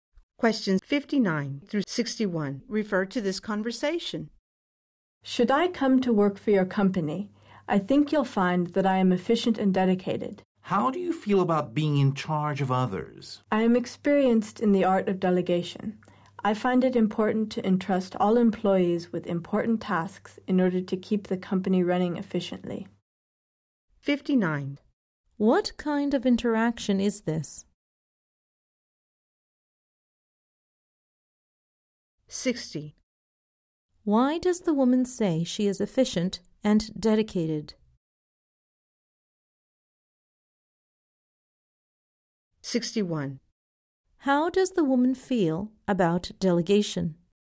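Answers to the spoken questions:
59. A job interview
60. To get hired
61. It is important for efficiency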